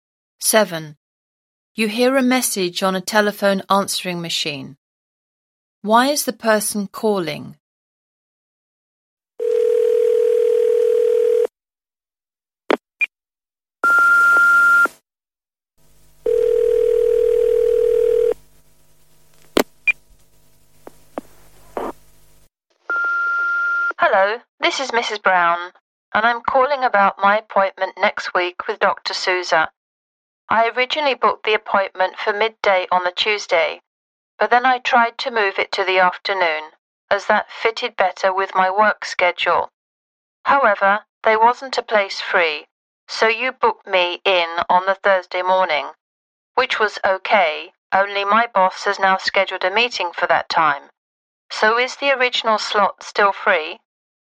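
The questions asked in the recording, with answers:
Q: Why is the person calling?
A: To change her appointment back to the original time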